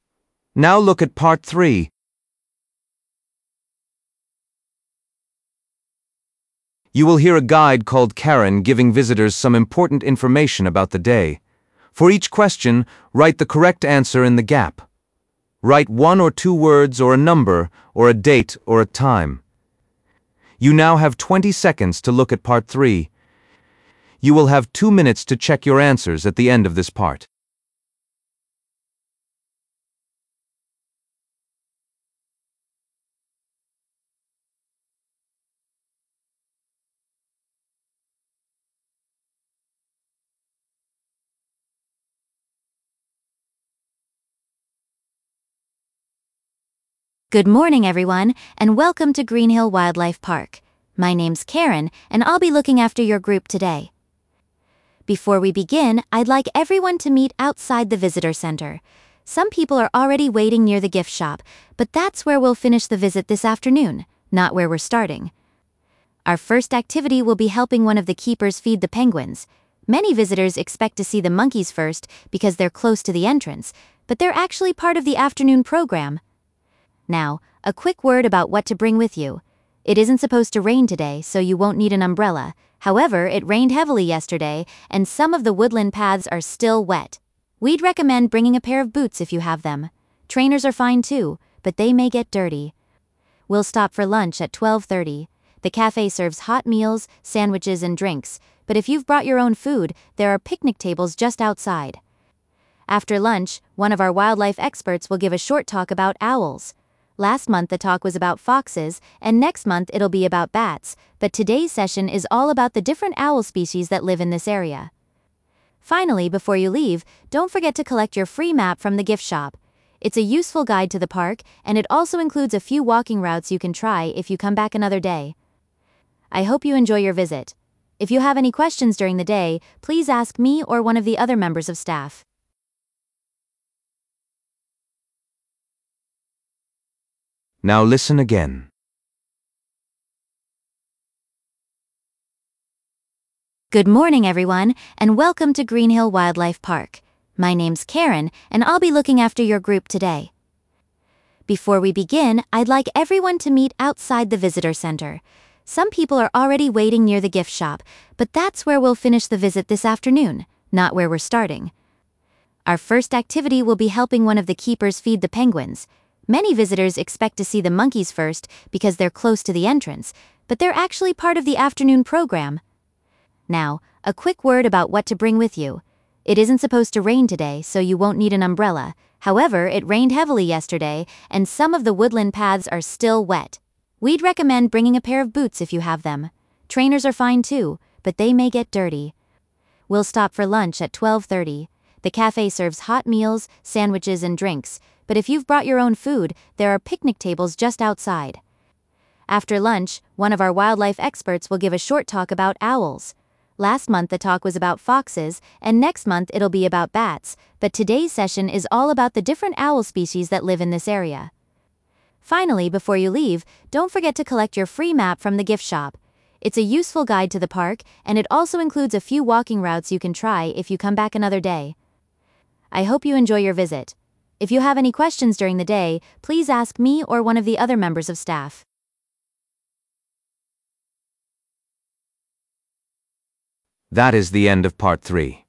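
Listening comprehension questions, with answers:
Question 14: Visitors are asked to meet outside the 14 .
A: visitor center

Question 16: Visitors should take 16 with them because some paths can be muddy.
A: boots

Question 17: Lunch will be served at 17 .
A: 12:30

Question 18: The afternoon includes a short lecture on 18 .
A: owls

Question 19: Before leaving, everyone receives a small 19 .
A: map

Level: B1 Preliminary (PET)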